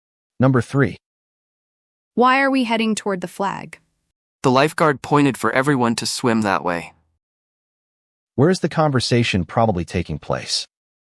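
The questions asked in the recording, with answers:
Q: Where is the conversation probably taking place?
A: At a beach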